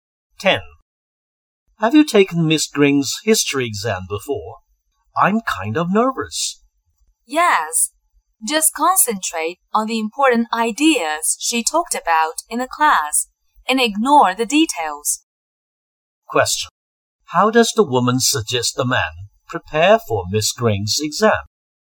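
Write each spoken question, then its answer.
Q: How does the woman suggest the man prepare for Miss Green's exam?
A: Focus on the important ideas from class and ignore the details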